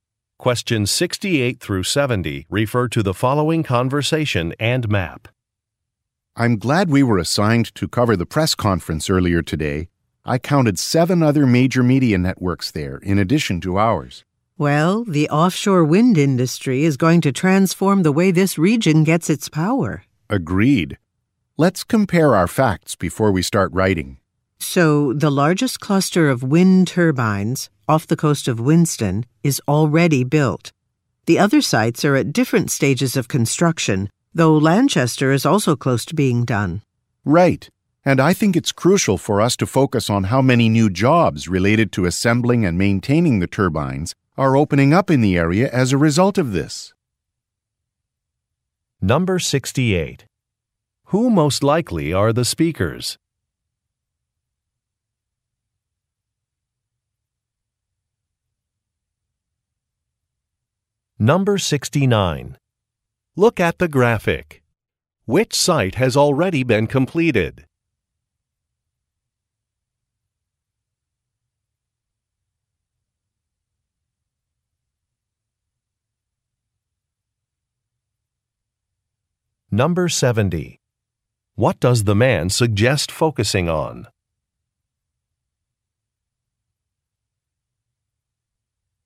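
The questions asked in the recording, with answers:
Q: Who most likely are the speakers?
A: Journalists

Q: What does the man suggest focusing on?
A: New jobs created in the area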